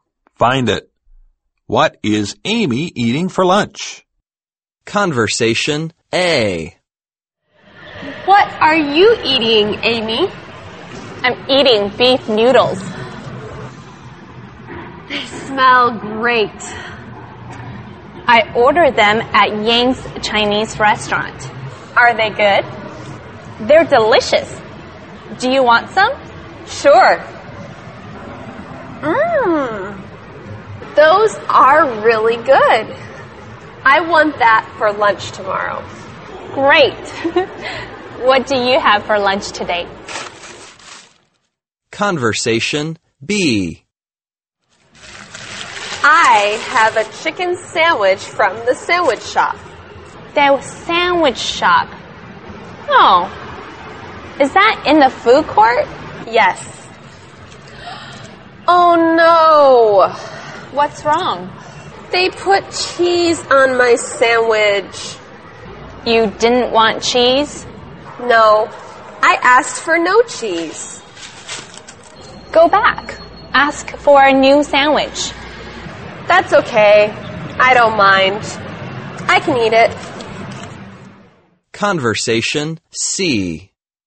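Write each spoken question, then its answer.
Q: What is Amy eating for lunch?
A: Beef noodles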